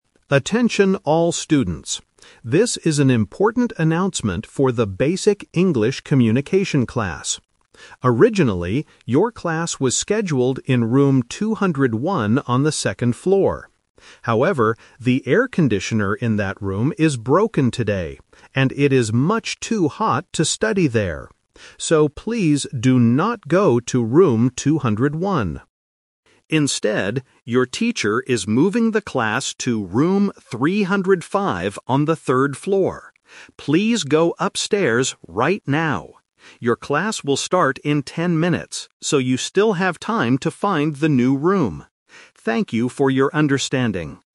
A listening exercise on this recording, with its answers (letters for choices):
Listen to the announcement and circle the correct answer (A, B, or C).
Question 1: Where is the English class today?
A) In Room 201.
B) In Room 305.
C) In Room 402.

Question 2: Why did the classroom change?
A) Because the room is too small.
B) Because the teacher is on the third floor.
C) Because the air conditioner is broken.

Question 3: When will the class begin?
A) Right now.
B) In ten minutes.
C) In an hour.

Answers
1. B
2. C
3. B

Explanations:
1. The announcer explicitly gives the new location: "...your teacher is moving the class to Room 305 on the third floor." Why the trap is wrong: Option (A) is the trap (The Twist). Room 201 is where the class was "originally" scheduled, but the announcer says, "please do not go to Room 201." Option (C) was not mentioned.
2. The announcer explains the problem clearly: "However, the air conditioner in that room is broken today..." Why the trap is wrong: Option (B) is a trap. The third floor is mentioned as the new location, but it is not the reason for the change. Option (A) is a plausible reason for changing a room, but it was not mentioned.
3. The announcer tells the students exactly when to expect the lesson to begin: "Your class will start in ten minutes..." Why the trap is wrong: Option (A) is the trap. The students need to "go upstairs right now," but the class itself doesn't start right now. Option (C) was not mentioned.

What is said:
Announcer: Attention all students. This is an important announcement for the Basic English Communication class. Originally, your class was scheduled in Room 201 on the second floor. However, the air conditioner in that room is broken today, and it is much too hot to study there. So, please do not go to Room 201.
Instead, your teacher is moving the class to Room 305 on the third floor. Please go upstairs right now. Your class will start in ten minutes, so you still have time to find the new room. Thank you for your understanding.